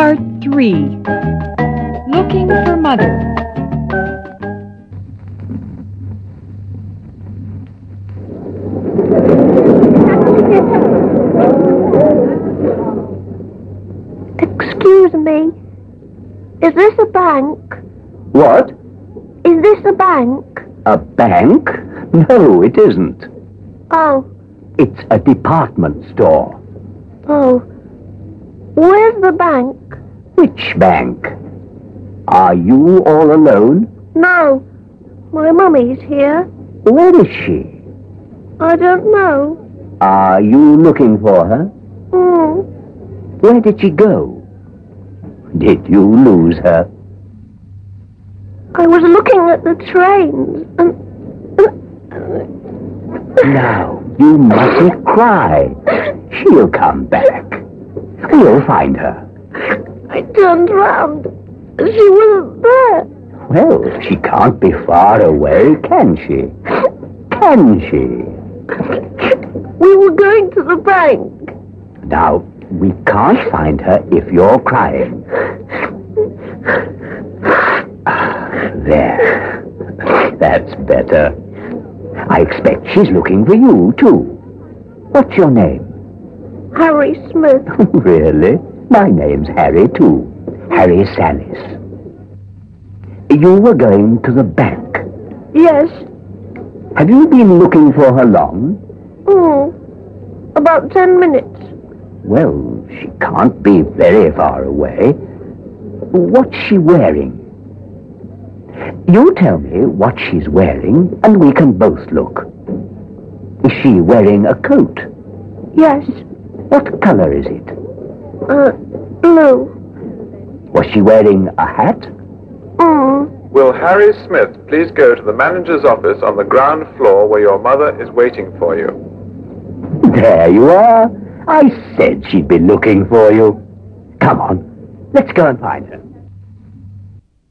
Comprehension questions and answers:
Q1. Where is the boy?______________1____________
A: Department Store

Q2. Who is he looking for?____________________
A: His mother.

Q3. What was he looking at when he was in the store?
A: Looking the train.

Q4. Where were the boy and his mother going?__________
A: Bank.

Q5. What is the boy's name?________________________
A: Harry Smiths.

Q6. What is the gentleman's name?___________________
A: Harry Salhce.

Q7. How long has the boy been looking for his mother?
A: About 10 minutes.

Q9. What colour is it?_____________________________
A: Blue.

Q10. Where is the boy's mother waiting for him?________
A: The manager office.